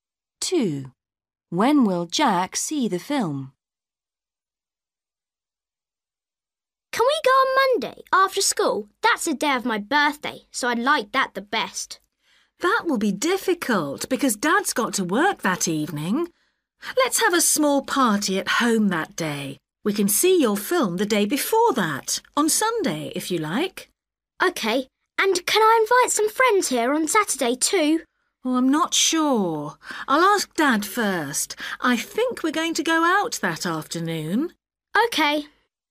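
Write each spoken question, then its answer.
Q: When will Jack see the film?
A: on Sunday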